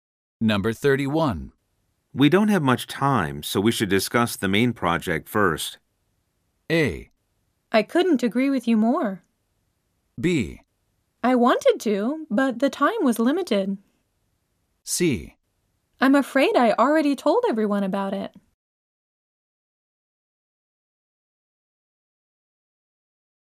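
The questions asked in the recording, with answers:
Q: We don't have much time, so we should discuss the main project first.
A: A: I couldn't agree with you more.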